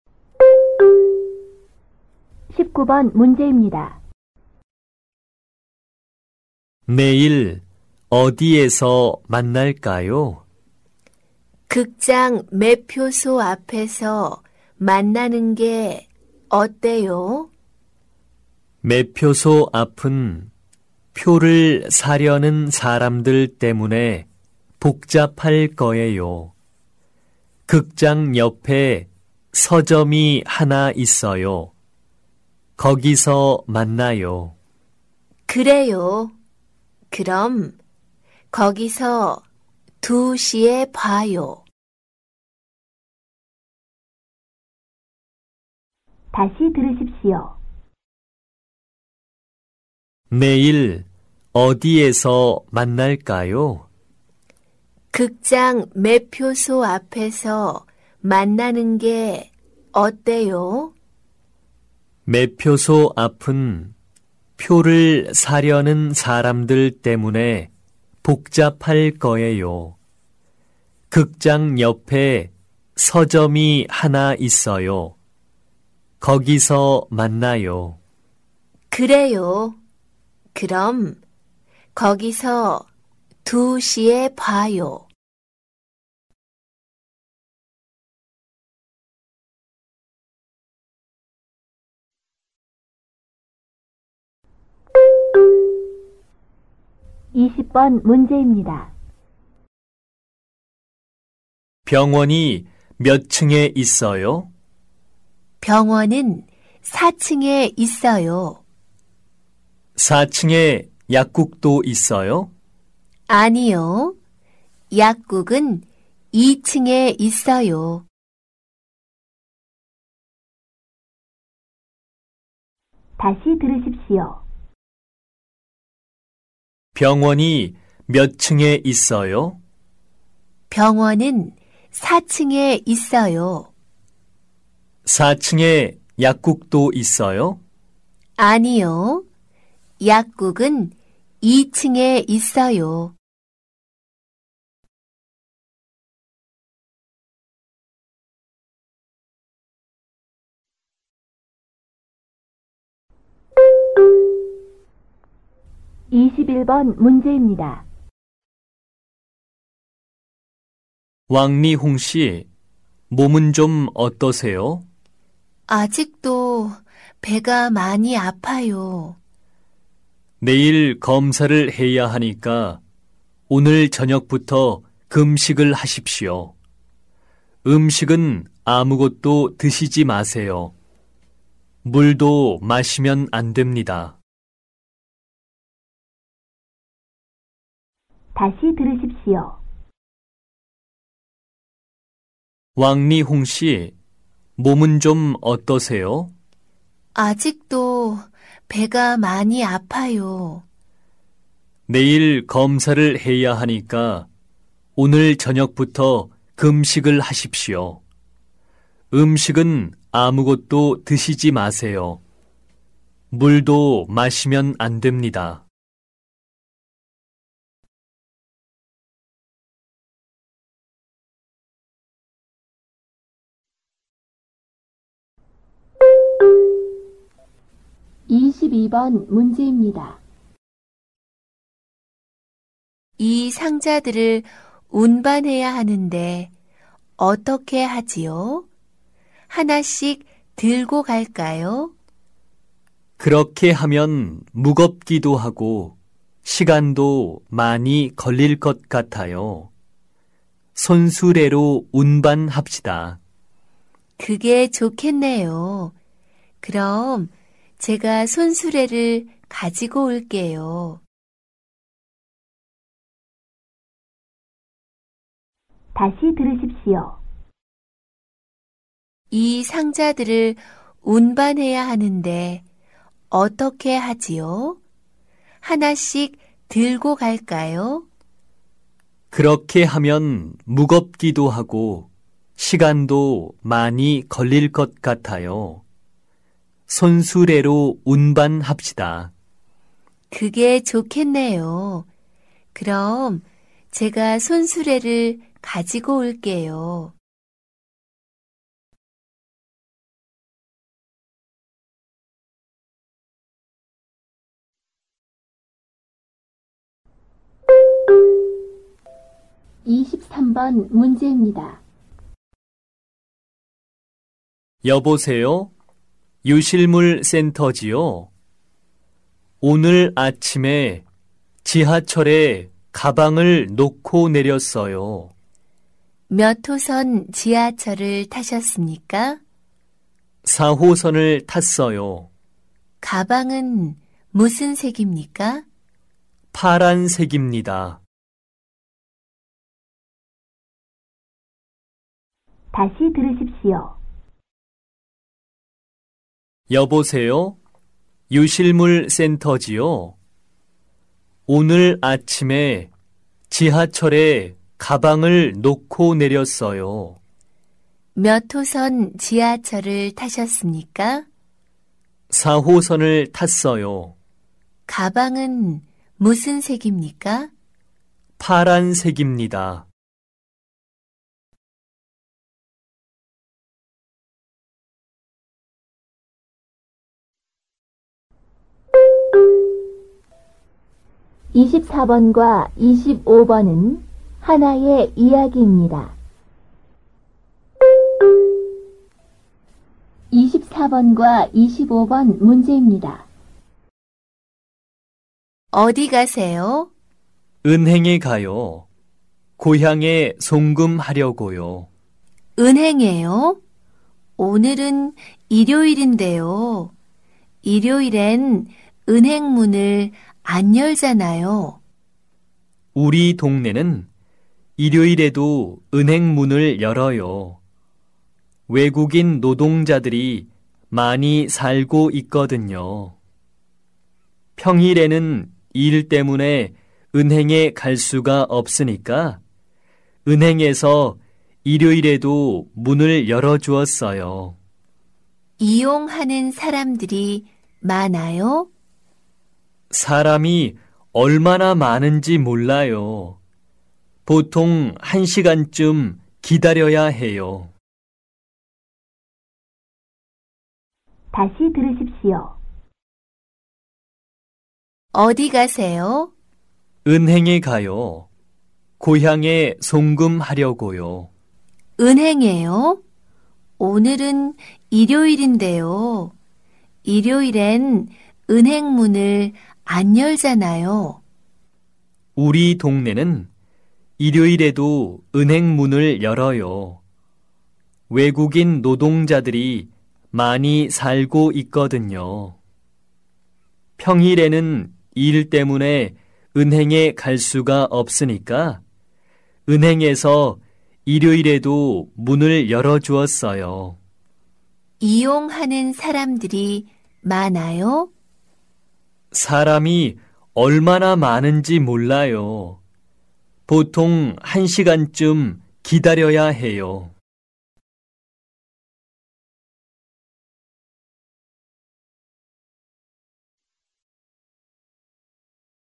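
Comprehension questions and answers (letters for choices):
보기 문제 [18~25] 이야기를 듣고 질문에 알맞은 대답을 고르십시오.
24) 오늘은 무슨 요일입니까?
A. 월요일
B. 수요일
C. 토요일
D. 일요일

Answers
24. D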